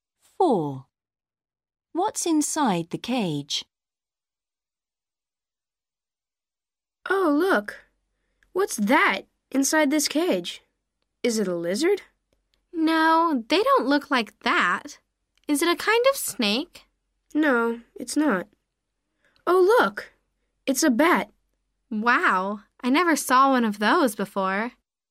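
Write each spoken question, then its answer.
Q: What's inside the cage?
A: a bat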